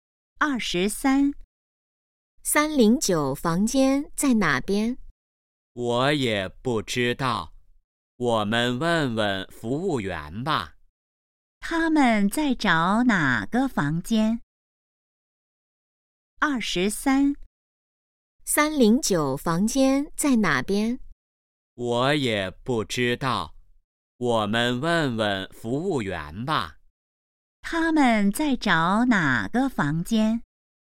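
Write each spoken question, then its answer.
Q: 他们在找哪个房间?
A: 309房间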